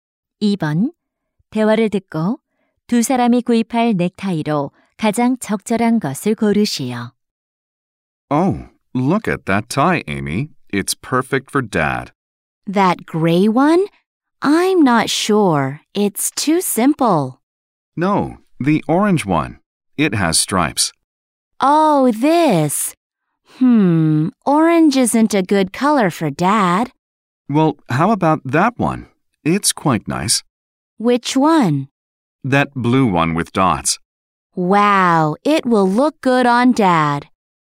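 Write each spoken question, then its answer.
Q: 대화를 듣고 두 사람이 구입할 넥타이로 가장 적절한 것을 고르시오.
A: 물방울무늬가 있는 파란색 넥타이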